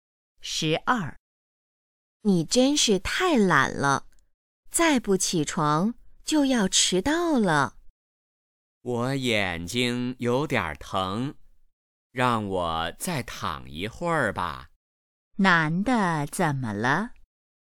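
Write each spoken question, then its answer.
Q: 男的怎么了?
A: 眼睛有点疼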